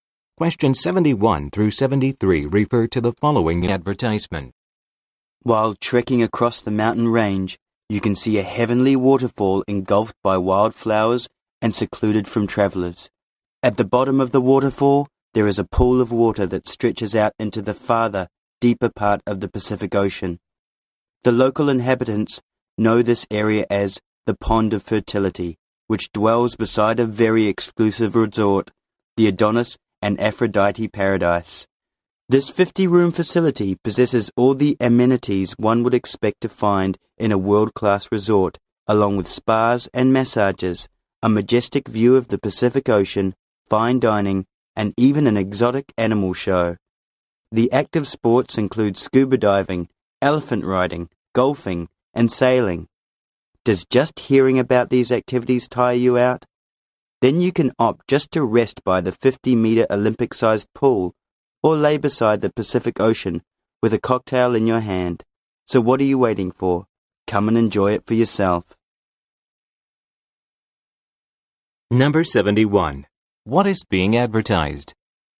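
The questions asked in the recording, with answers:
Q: What is being advertised?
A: A resort (the Adonis and Aphrodite Paradise)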